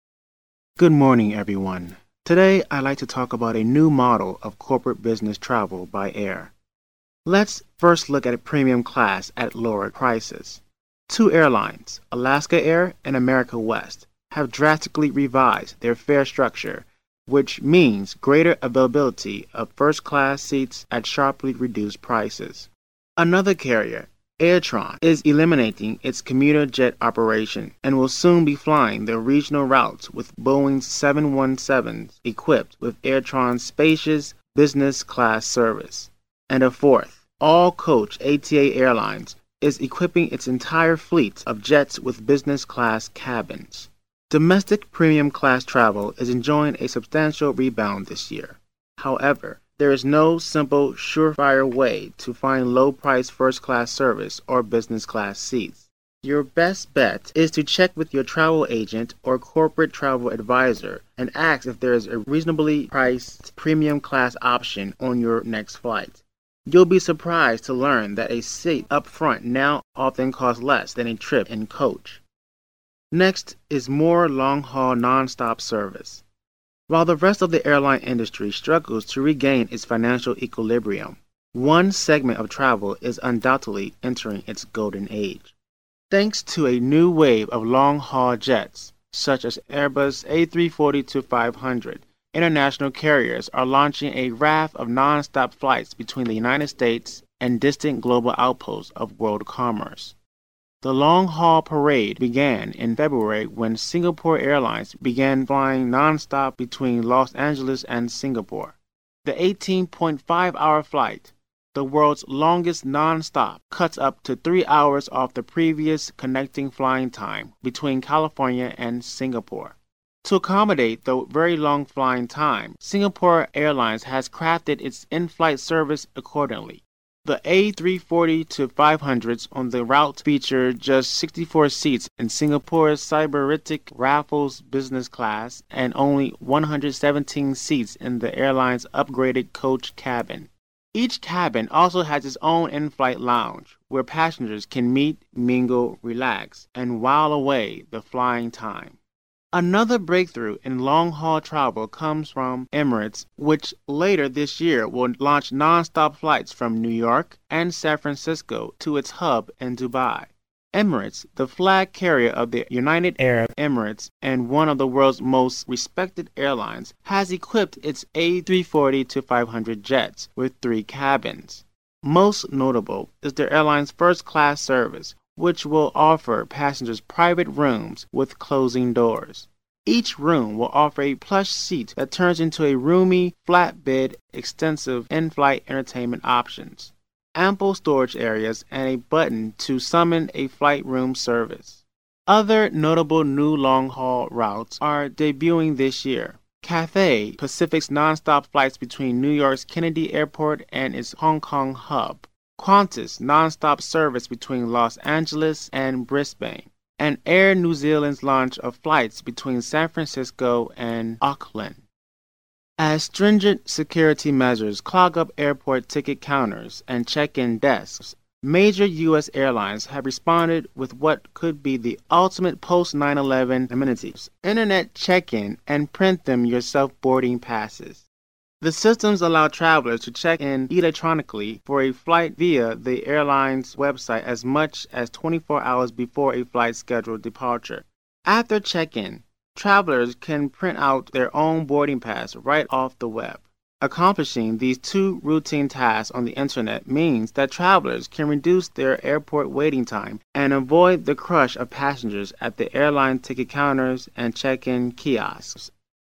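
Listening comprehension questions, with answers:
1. Alaska Air and America West have revised ______.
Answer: their fare structure

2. Air Trans is eliminating ______.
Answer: its commuter jet operation

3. It will soon be flying the ______ with Boeing 717s.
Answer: regional routes

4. Best bet: check with travel agent to ask about premium-class ______.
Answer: option

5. International carriers are launching a raft of ______ between US and other world countries.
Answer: non-stop flights

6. Flying time between California and Singapore is cut up to ______ off.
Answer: three hours

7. Singapore Airlines has crafted in-flight service to accommodate the ______.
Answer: very long flying time

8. Emirates has equipped its ______ jets with three cabins.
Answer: A340-500

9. It has also offered first-class passengers ______ with closing doors.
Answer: private rooms

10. Qantas will launch nonstop service between ______ and Brisbane.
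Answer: Los Angeles

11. Internet check-in and ______ boarding passes.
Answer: print-them-yourself

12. Checking-in on the Web means reducing airport ______ and avoiding crashing.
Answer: waiting time

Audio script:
Today, I'd like to talk about a new model of corporate business travel by air. Let's first look at premium class at lower prices. Two airlines, Alaska Air and America West, have drastically revised their fare structure which means greater availability of first-class seats at sharply reduced prices. Another carrier, AirTran, is eliminating its commuter-jet operation and will soon be flying the regional routes with Boeing 717s equipped with AirTran's spacious, business-class service. And a fourth, all-coach ATA Airlines, is equipping its entire fleet of jets with business-class cabins. Domestic premium-class travel is enjoying a substantial rebound this year. However, there is no simple, surefire way to find low-priced first-class service or business-class seats. 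Your best bet is to check with your travel agent or corporate travel adviser and ask if there is a reasonably priced premium-class option on your next flight. You'll be surprised to learn that a seat up front now often costs less than a trip in coach. Next is more long-haul nonstop service. While the rest of the airline industry struggles to regain its financial equilibrium, one segment of travel is undoubtedly entering its golden age. Thanks to a new wave of long-haul jets such as the Airbus A340-500, international carders are launching a raft of non-stop flights between the United States and distant global outposts of world commerce. The long-haul parade began in February when Singapore Airlines began flying nonstop between Los Angeles and Singapore. The 18.5-hour flight, the world's longest nonstop, cuts up to 3 hours off the previous connecting flying time between California and Singapore. 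To accommodate the very long flying time, Singapore Airlines has crafted its in-flight service accordingly. The A340-500s on the route feature just 64 seats in Singapore's sybaritic Raffles business class and only 117 seats in the airline's upgraded coach cabin. Each cabin also has its own in-flight lounge where passengers can meet, mingle, relax and wile away the flying time. Another breakthrough in long-haul travel comes from Emirates, which later this year will launch nonstop flights from New York and San Francisco to its hub in Dubai. Emirates, the flag carrier of the United Arab Emirates and one of the world's most respected air-lines, has equipped its A340-500 jets with three cabins. Most notable is the airline's first-class service, which will offer passengers private rooms with closing doors. Each room will offer a plush seat that turns into a roomy, flat bed, extensive in-flight entertainment options, ample storage areas and a button to summon in-flight room service. 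Other notable new long-haul routes are debuting this year: Cathay Pacific's nonstop flights between New York's Kennedy airport and its Hong Kong hub; Qantas' nonstop service between Los Angeles and Brisbane; and Air New Zealand's launch of flights between San Francisco and Auckland. As stringent security measures clog up airport ticket counters and check-in desks, major U. S. airlines have responded with what could be the ultimate post-9. 11 amenities: Internet check-in and print-them-yourself boarding passes. The systems allow travelers to check in electronically for a flight via the airline's Website as much as 24 hours before a flight's scheduled departure. After checking in, travelers can then print out their own boarding passes right off the Web. Accomplishing these two routine tasks on the Internet means that travelers can reduce their airport waiting time and avoid the crash of passengers at airline ticket counters and check-in kiosks.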